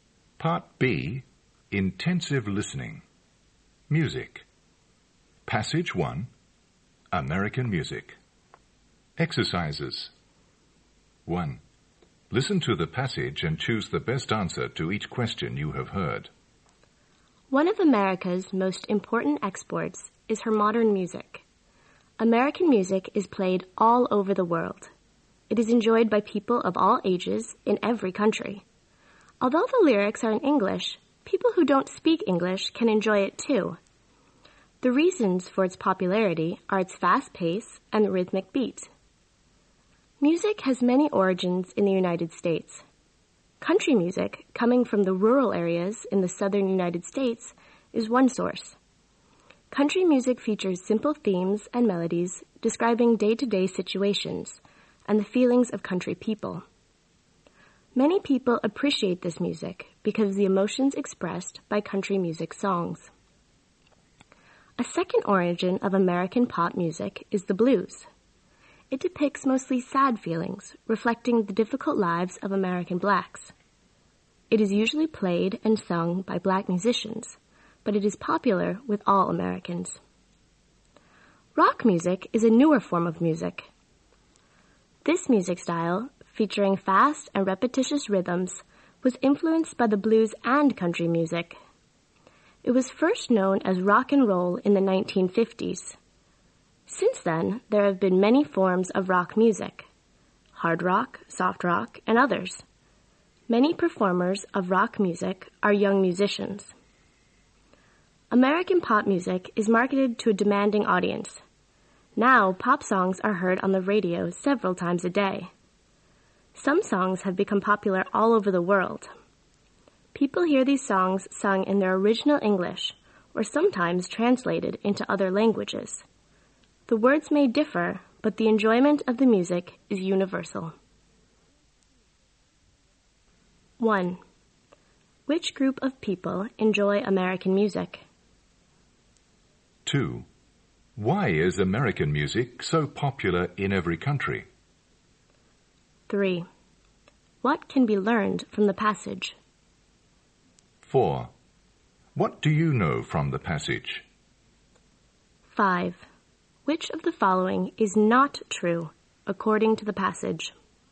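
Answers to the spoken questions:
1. People of all ages in every country
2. Its fast pace and rhythmic beat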